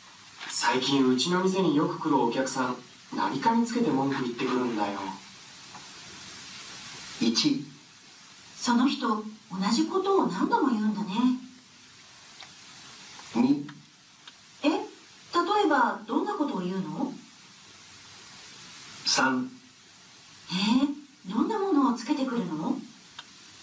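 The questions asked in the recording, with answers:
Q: 最近うちの店によく来るお客さん何かにつけて文句言ってくるんだよ。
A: 2: え、例えばどんなことを言うの。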